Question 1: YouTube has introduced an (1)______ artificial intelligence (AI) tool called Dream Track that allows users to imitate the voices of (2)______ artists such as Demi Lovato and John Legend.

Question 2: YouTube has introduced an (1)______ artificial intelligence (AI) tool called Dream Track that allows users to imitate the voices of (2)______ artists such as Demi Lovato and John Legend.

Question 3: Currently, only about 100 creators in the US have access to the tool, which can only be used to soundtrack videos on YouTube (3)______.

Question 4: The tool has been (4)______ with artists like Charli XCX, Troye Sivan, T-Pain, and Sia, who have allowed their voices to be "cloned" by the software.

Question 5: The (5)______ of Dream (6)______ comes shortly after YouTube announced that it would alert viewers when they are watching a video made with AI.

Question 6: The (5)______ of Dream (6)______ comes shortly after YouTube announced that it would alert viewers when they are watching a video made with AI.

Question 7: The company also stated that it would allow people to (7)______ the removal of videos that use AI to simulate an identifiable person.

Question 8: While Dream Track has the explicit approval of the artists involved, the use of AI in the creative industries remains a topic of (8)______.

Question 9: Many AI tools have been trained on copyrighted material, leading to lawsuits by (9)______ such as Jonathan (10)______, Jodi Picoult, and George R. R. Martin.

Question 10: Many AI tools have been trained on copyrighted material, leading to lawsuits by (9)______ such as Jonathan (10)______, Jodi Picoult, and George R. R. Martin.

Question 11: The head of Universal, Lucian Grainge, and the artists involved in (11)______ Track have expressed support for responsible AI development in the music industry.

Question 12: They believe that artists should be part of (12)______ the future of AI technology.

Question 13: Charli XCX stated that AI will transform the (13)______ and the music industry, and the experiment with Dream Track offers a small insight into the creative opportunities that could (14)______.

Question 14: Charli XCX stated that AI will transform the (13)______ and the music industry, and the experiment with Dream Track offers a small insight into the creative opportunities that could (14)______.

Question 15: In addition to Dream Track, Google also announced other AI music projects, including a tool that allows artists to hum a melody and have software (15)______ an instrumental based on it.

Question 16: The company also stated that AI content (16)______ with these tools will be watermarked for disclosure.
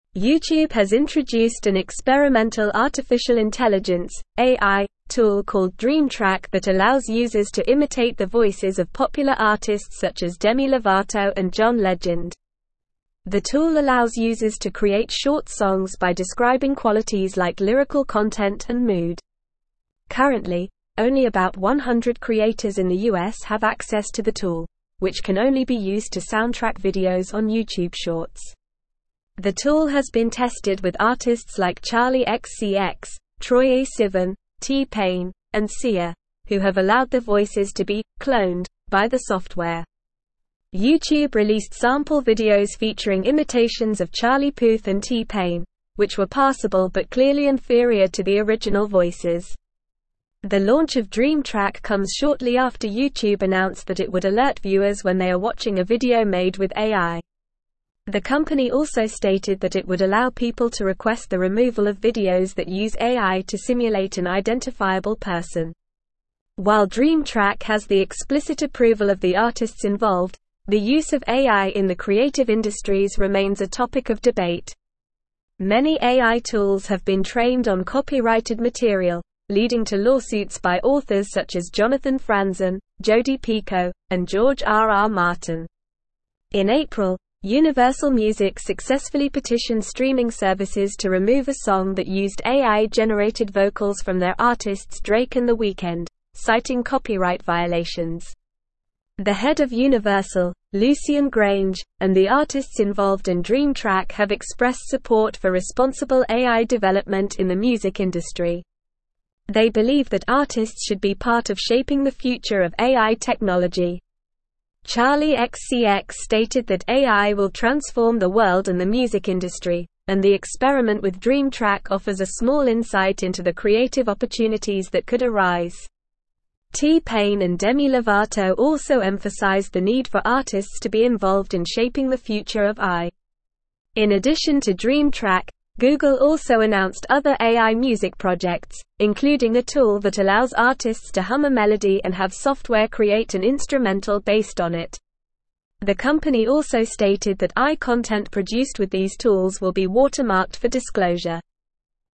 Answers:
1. experimental
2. popular
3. Shorts
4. tested
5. launch
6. Track
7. request
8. debate
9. authors
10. Franzen
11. Dream
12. shaping
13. world
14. arise
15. create
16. produced

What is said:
YouTube has introduced an experimental artificial intelligence (AI) tool called Dream Track that allows users to imitate the voices of popular artists such as Demi Lovato and John Legend. The tool allows users to create short songs by describing qualities like lyrical content and mood. Currently, only about 100 creators in the US have access to the tool, which can only be used to soundtrack videos on YouTube Shorts. The tool has been tested with artists like Charli XCX, Troye Sivan, T-Pain, and Sia, who have allowed their voices to be "cloned" by the software. YouTube released sample videos featuring imitations of Charlie Puth and T-Pain, which were passable but clearly inferior to the original voices.
The launch of Dream Track comes shortly after YouTube announced that it would alert viewers when they are watching a video made with AI. The company also stated that it would allow people to request the removal of videos that use AI to simulate an identifiable person. While Dream Track has the explicit approval of the artists involved, the use of AI in the creative industries remains a topic of debate. Many AI tools have been trained on copyrighted material, leading to lawsuits by authors such as Jonathan Franzen, Jodi Picoult, and George R. R. Martin. In April, Universal Music successfully petitioned streaming services to remove a song that used AI-generated vocals from their artists Drake and The Weeknd, citing copyright violations.
The head of Universal, Lucian Grainge, and the artists involved in Dream Track have expressed support for responsible AI development in the music industry. They believe that artists should be part of shaping the future of AI technology. Charli XCX stated that AI will transform the world and the music industry, and the experiment with Dream Track offers a small insight into the creative opportunities that could arise. T-Pain and Demi Lovato also emphasized the need for artists to be involved in shaping the future of AI.
In addition to Dream Track, Google also announced other AI music projects, including a tool that allows artists to hum a melody and have software create an instrumental based on it. The company also stated that AI content produced with these tools will be watermarked for disclosure.

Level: Level 4